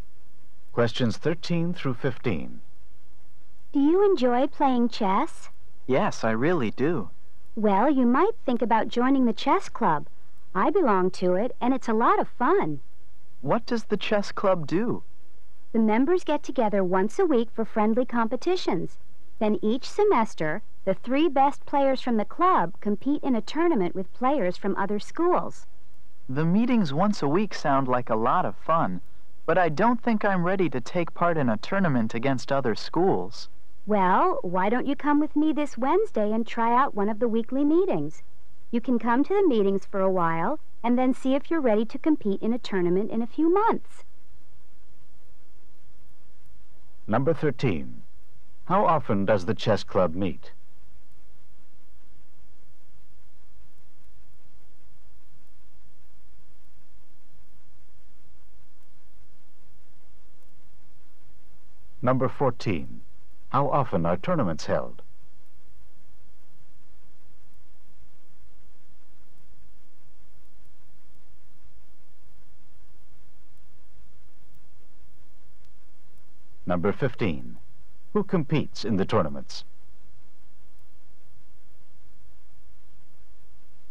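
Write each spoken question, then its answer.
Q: How often does the chess club meet?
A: Once a week

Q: How often are tournaments held?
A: Each semester

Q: Who competes in the tournaments?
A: The three best players from the club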